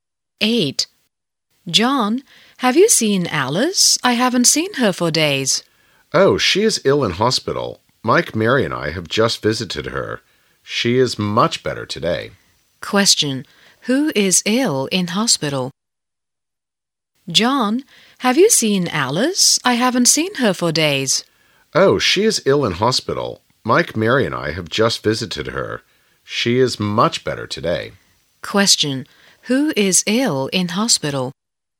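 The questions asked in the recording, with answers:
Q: Who is ill in hospital?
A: Alice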